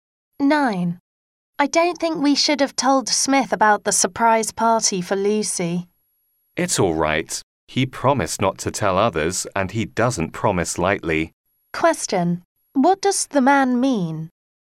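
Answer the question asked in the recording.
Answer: Smith can be trusted to keep the secret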